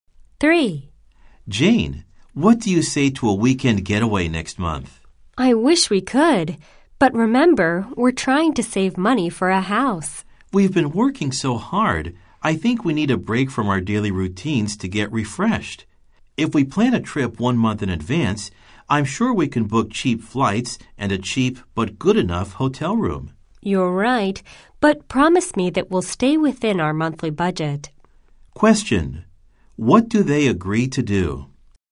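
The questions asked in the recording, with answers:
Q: What do they agree to do?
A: Take a weekend trip next month while staying within their monthly budget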